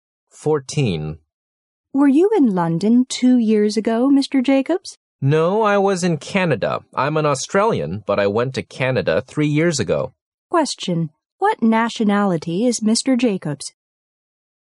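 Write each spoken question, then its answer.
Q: what nationality is Mr. Jacobs?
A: Australian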